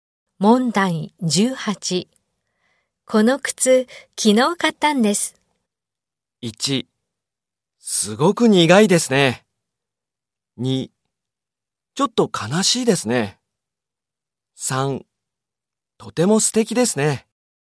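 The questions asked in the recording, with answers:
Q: この靴、昨日買ったんです。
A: 3: とても素敵ですね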